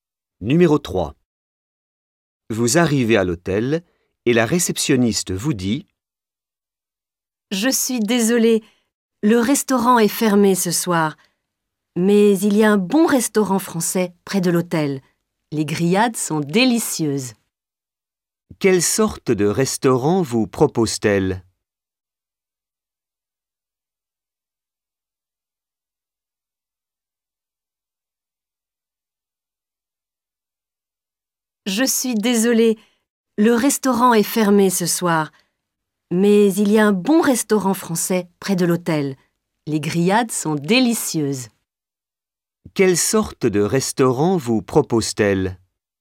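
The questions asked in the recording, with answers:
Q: Quelle sorte de restaurant vous propose-t-elle?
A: Un restaurant français (grillades)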